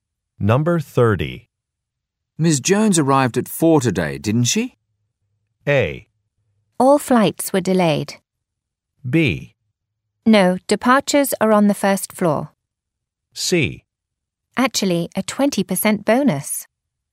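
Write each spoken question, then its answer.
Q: Ms. Jones arrived at 4 today, didn't she?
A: A: All flights were delayed.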